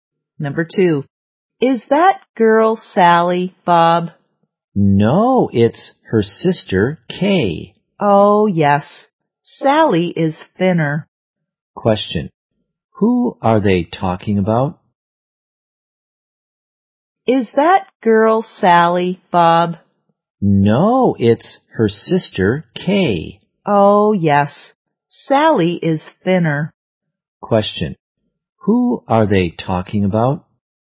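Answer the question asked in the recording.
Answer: Kay, Sally's sister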